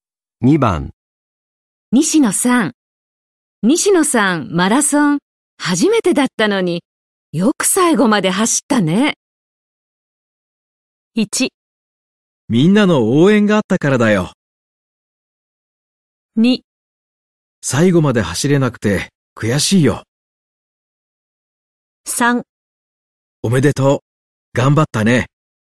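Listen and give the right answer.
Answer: 1: みんなの応援があったからだよ。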